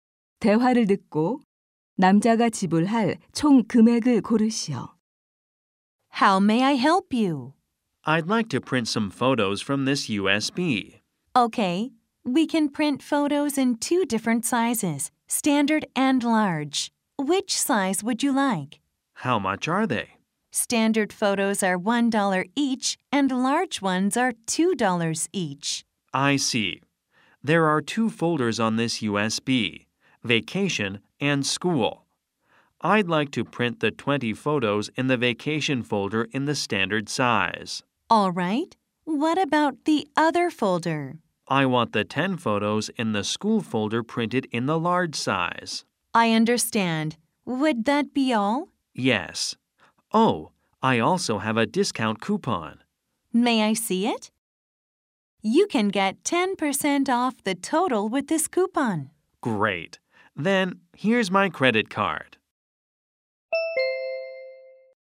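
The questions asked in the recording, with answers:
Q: 대화를 듣고 남자가 지불할 총 금액을 고르시오.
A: 36달러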